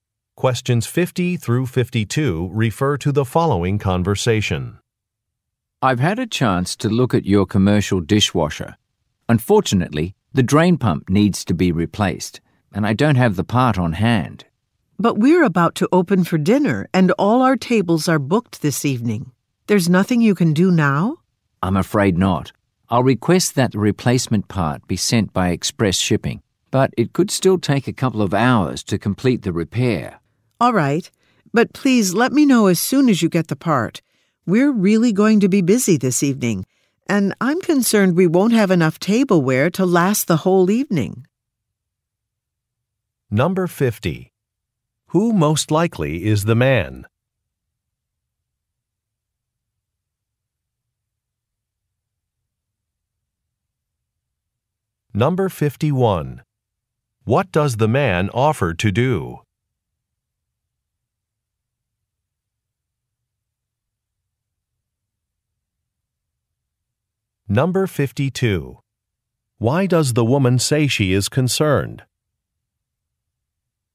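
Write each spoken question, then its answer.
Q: Who most likely is the man?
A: A repair technician

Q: What does the man offer to do?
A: Request express shipping for the replacement part

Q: Why does the woman say she is concerned?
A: They may not have enough tableware for the evening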